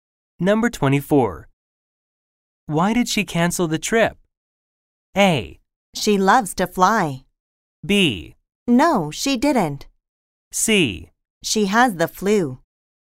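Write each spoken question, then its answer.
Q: Why did she cancel the trip?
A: C: She has the flu.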